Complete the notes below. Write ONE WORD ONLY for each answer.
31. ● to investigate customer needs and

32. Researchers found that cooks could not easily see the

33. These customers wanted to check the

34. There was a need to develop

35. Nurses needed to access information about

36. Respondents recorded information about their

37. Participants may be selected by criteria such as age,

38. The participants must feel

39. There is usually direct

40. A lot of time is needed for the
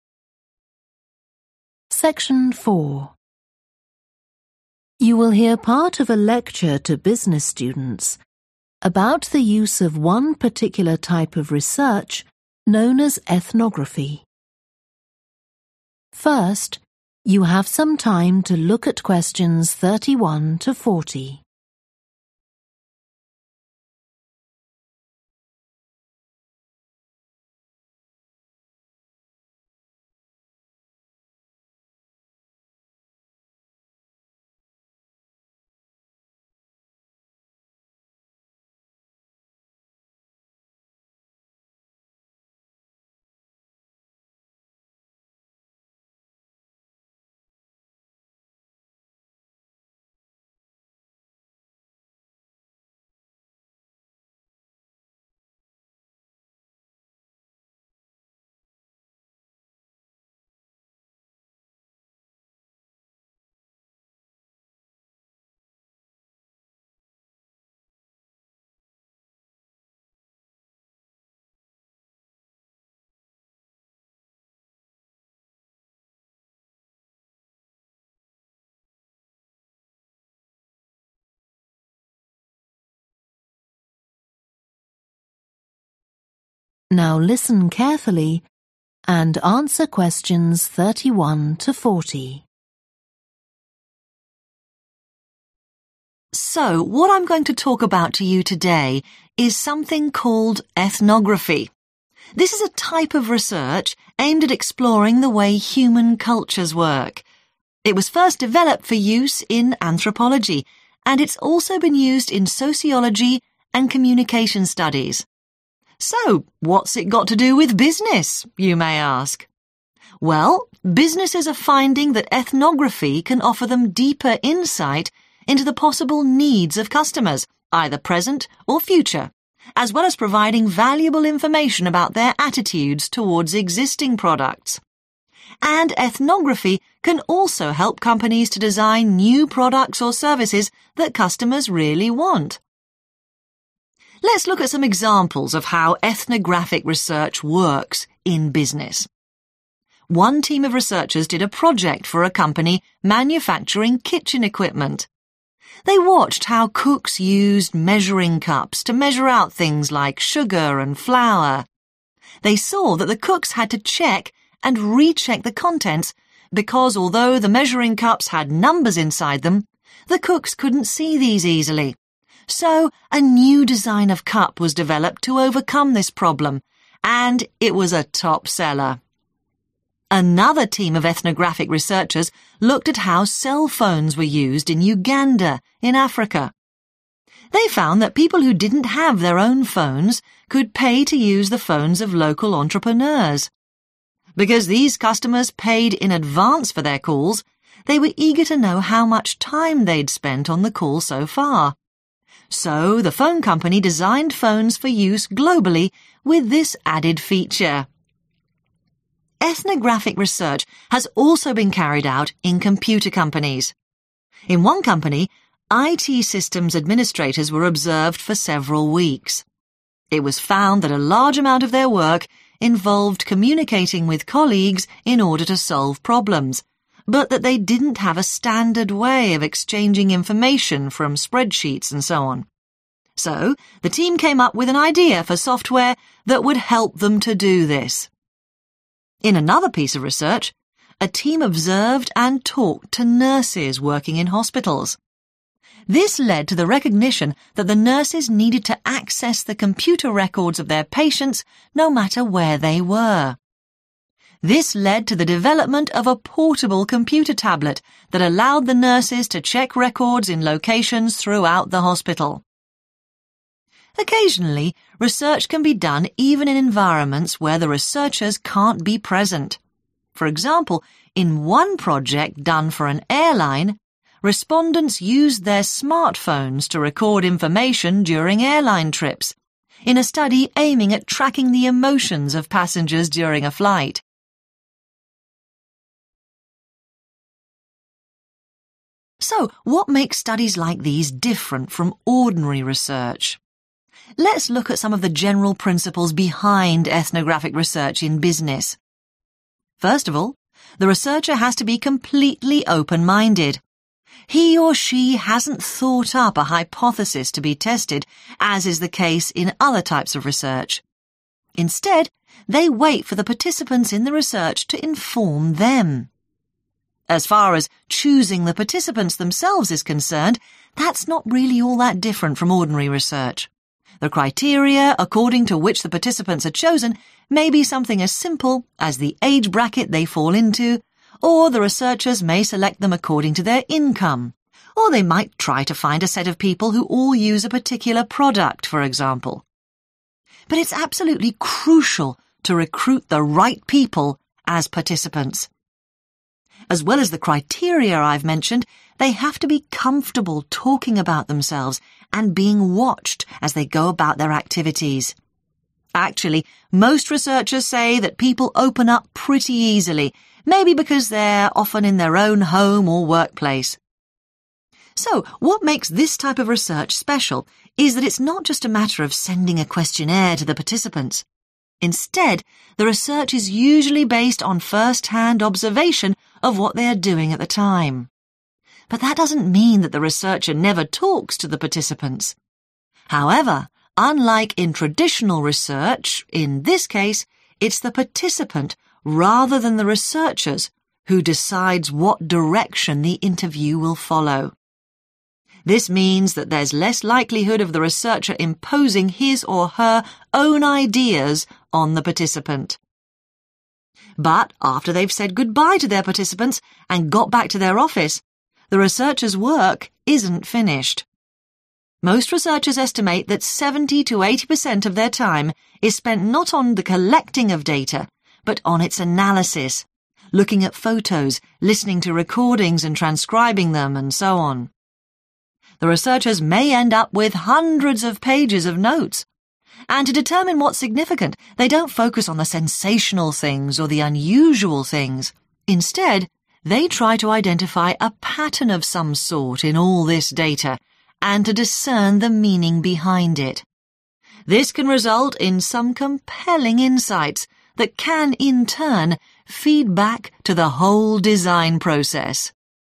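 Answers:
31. attitude
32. numbers
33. time
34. software
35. patients
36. emotions
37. income
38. comfortable
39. observation
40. analysis

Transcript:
So what I'm going to talk about to you today is something called Ethnography. This is a type of research aimed at exploring the way human cultures work. It was first developed for use in anthropology, and it's also been used in sociology and communication studies. So what's it got to do with business, you may ask. And ethnography can also help companies to design new products or services that customers really want.
Let's look at some examples of how ethnographic research works in business. One team of researchers did a project for a company manufacturing kitchen equipment. They watched how cooks used measuring cups to measure out things like sugar and flour. So a new design of cup was developed to overcome this problem, and it was a top seller.
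Another team of ethnographic researchers looked at how cell phones were used in Uganda, in Africa. They found that people who didn't have their own phones could pay to use the phones of local entrepreneurs. Because these customers paid in advance for their calls, (Q33) they were eager to know how much time they'd spent on (= used) the call so far (họ háo hức muốn biết xem mình đã dành bao nhiêu thời gian gọi điện từ trước đến nay) So the phone company designed phones for use globally with this added feature.
Ethnographic research has also been carried out in computer companies. In one company, IT systems administrators were observed for several weeks. It was found that a large amount of their work involved communicating with colleagues (= communication between system administrators and colleagues) in order to solve problems, but that (Q34) they didn't have a standard way of exchanging information from spreadsheets and so on. 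So the team came up with an idea (= a need to develop) for software that would help them to do this.
In another piece of research, a team observed and talked to nurses working in hospitals. (Q35) This led to the recognition that the nurses needed to access the computer records (= nurses needed to access information) of their patients, no matter where they were (Điều này dẫn đến một sự công nhận rằng các y tá cần truy cập vào hồ sơ của bệnh nhân trên máy tính cho dù là họ đang ở đâu.) This led to the development of a portable computer tablet that allowed the nurses to check records in locations throughout the hospital.
Occasionally, research can be done even in environments where the researchers can't be present. For example, in one project done for an airline, (Q36) respondents used their smartphones to record information during airline trips (= while travelling), in a study aiming at tracking the emotions of passengers during a flight.
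So what makes studies like these different from ordinary research? Let's look at some of the general principles behind ethnographic research in business. First of all, the researcher has to be completely open-minded – he or she hasn't thought up a hypothesis to be tested, as is the case in other types of research. Instead they wait for the participants in the research to inform them. As far as choosing the participants themselves is concerned, that's not really all that different from ordinary research – the criteria according to which the participants are chosen may be something as simple as the age bracket they fall into, (Q37) or the researchers may select them according to their income (hoặc các nhà nghiên cứu có thể lựa chọn chúng theo thu nhập của họ), or they might try to find a set of people who all use a particular product, for example. But it's absolutely crucial to recruit the right people as participants. 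Actually, most researchers say that people open up pretty easily, maybe because they're often in their own home or workplace.
So what makes this type of research special is that it's not just a matter of sending a questionnaire to the participants, instead (Q39) the research is usually based on first-hand (= direct) observation of what they are doing at the time (nghiên cứu thường dựa trên quan sát trực tiếp về những gì họ đang làm vào thời điểm đó). But that doesn't mean that the researcher never talks to the participants. However, unlike in traditional research, in this case it's the participant rather than the researchers who decides what direction the interview will follow. This means that there's less likelihood of the researcher imposing his or her own ideas on the participant.
But after they've said goodbye to their participants and got back to their office, the researchers' work isn't finished. 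The researchers may end up with hundreds of pages of notes. And to determine what's significant, they don't focus on the sensational things or the unusual things, instead they try to identify a pattern of some sort in all this data, and to discern the meaning behind it. This can result in some compelling insights that can in turn feed back to the whole design process.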